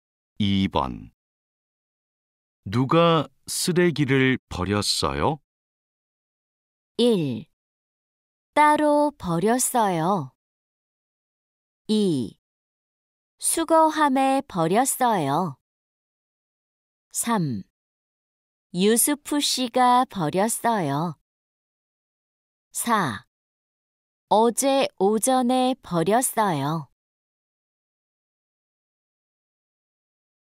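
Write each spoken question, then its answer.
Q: 누가 쓰레기를 버렸어요?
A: 3: 유스프 씨가 버렸어요.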